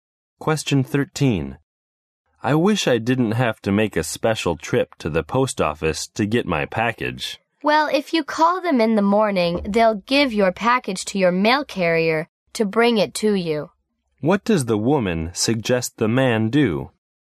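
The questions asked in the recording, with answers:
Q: What does the woman suggest the man do?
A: Call the post office in the morning so the mail carrier brings the package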